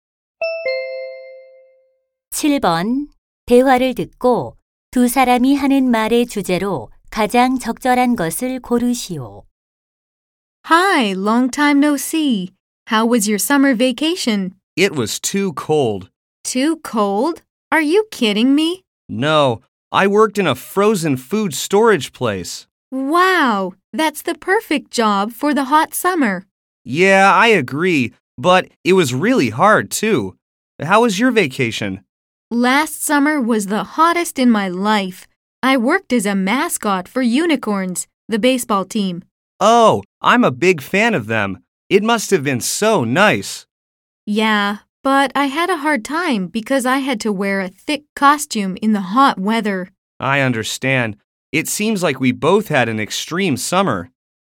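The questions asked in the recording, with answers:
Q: 대화를 듣고 두 사람이 하는 말의 주제로 가장 적절한 것을 고르시오.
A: 힘들었던 여름방학 아르바이트 경험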